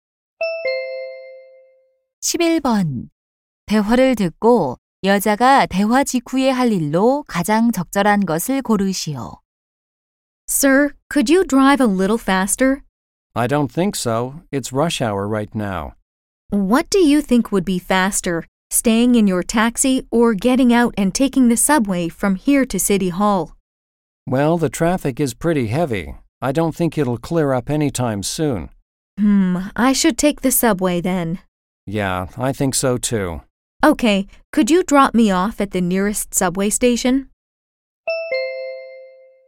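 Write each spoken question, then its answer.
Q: 대화를 듣고 여자가 대화 직후에 할 일로 가장 적절한 것을 고르시오.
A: 택시에서 내려 지하철 타기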